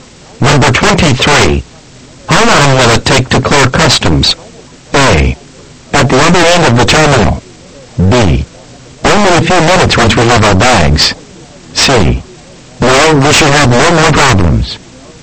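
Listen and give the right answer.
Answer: B: Only a few minutes once we have our bags.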